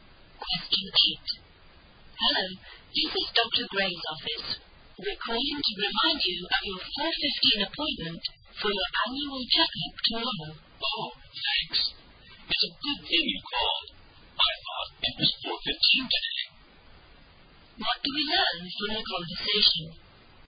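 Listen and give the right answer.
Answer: The speaker had the day of the appointment wrong: it is tomorrow, not today.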